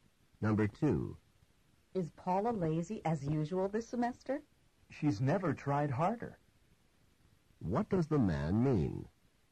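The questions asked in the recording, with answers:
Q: What does the man mean?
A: Paula is working harder than ever.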